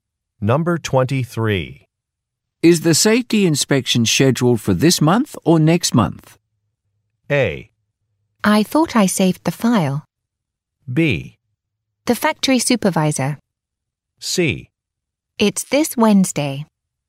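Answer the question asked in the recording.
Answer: C: It's this Wednesday.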